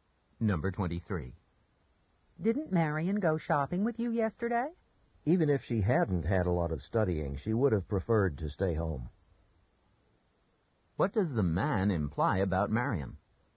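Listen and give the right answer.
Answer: She didn't go shopping; she preferred to stay home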